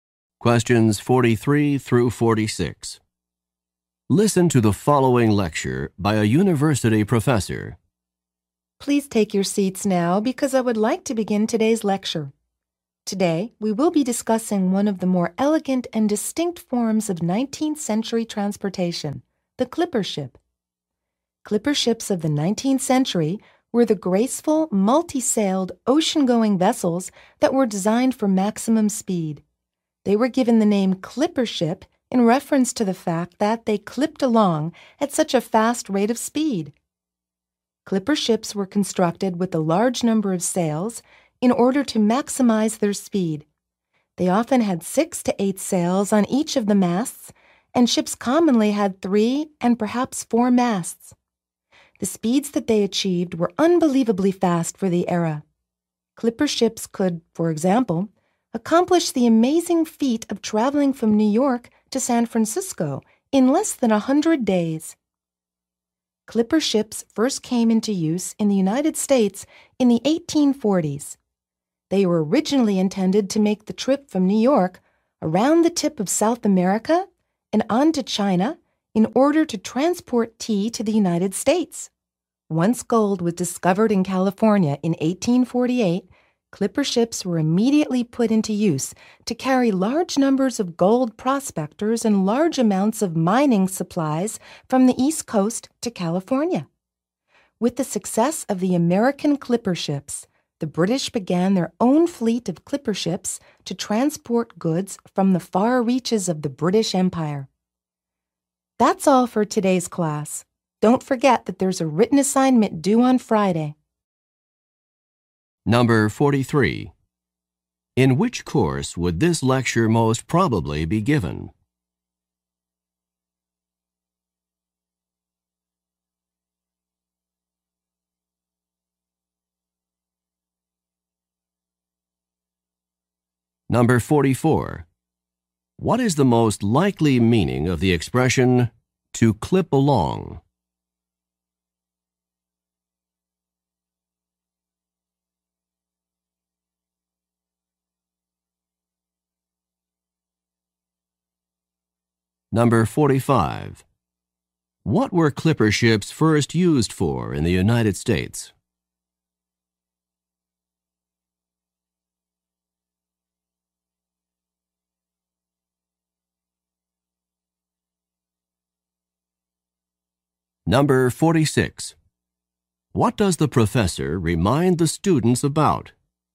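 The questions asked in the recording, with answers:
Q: What is the most likely meaning of the expression to clip along?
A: To move very fast

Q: What were clipper ships first used for in the United States?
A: Bringing tea from China

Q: What does the professor remind the students about?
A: A written assignment due on Friday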